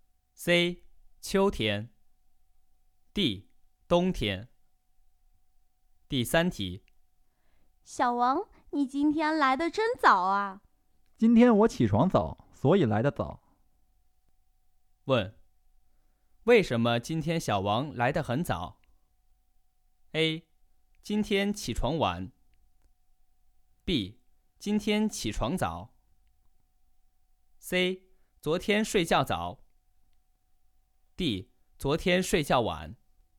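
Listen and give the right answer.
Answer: B: 今天起床早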